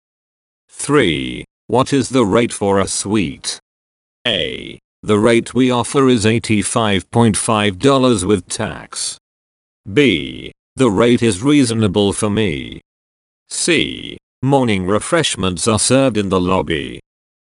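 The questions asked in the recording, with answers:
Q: What is the rate for a suite?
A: A: The rate we offer is $85.5 with tax.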